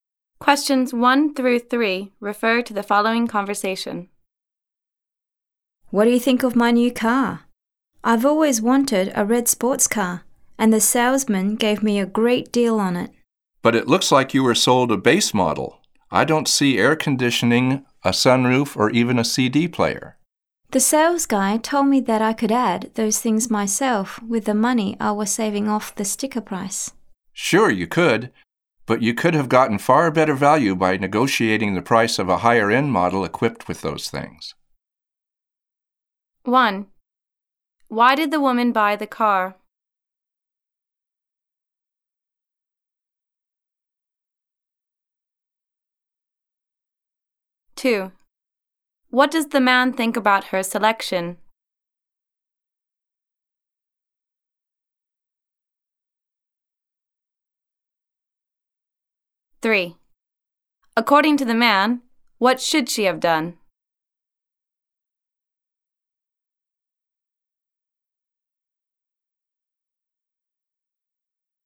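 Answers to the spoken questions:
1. She had always wanted a red sports car, and the salesman gave her a great deal on it.
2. He thinks it is a base model without extras, so it was not good value.
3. She should have negotiated the price of a higher-end model that already had those features.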